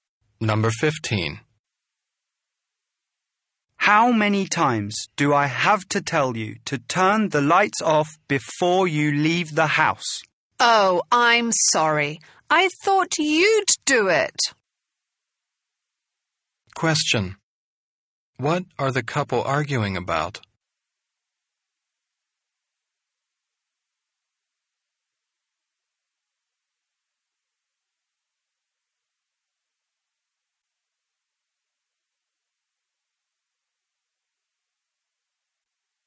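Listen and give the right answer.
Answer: Leaving the lights on when leaving the house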